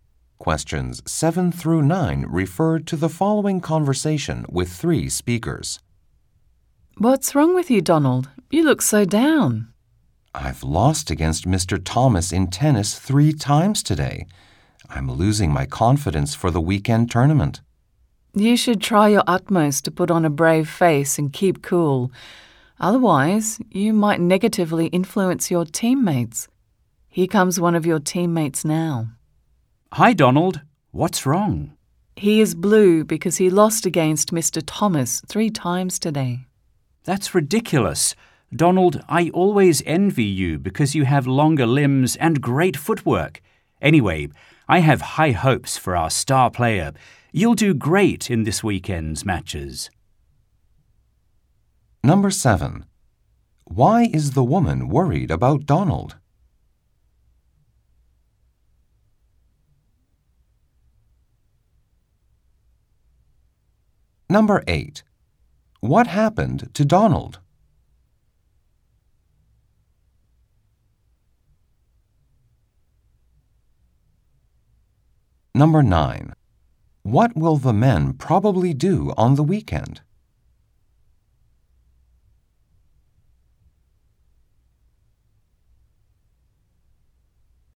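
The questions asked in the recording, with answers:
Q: What happened to Donald?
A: He lost to Mr. Thomas in tennis three times today

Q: What will the men probably do on the weekend?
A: Play in a tennis tournament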